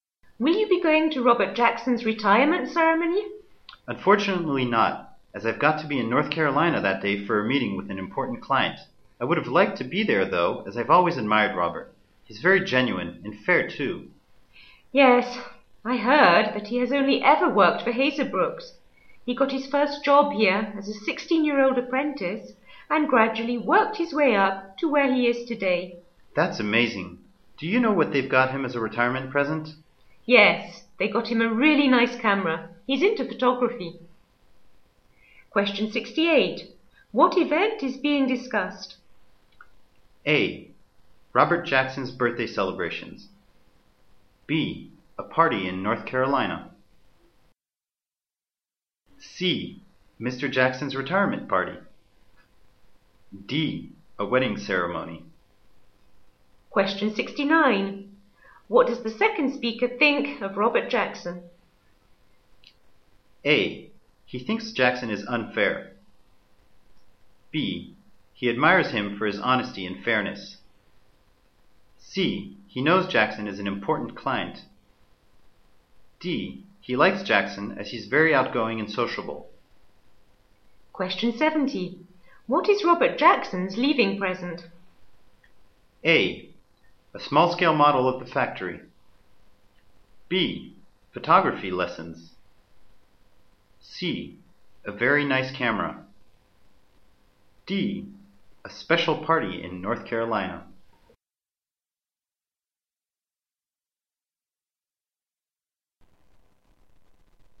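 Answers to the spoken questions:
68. C: Mr. Jackson's retirement party.
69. B: He admires him for his honesty and fairness.
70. C: A very nice camera.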